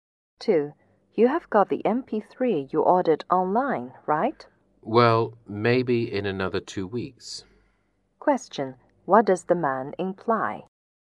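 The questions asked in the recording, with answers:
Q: What does the man imply?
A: He hasn't received the MP3 yet; it may take another 2 weeks.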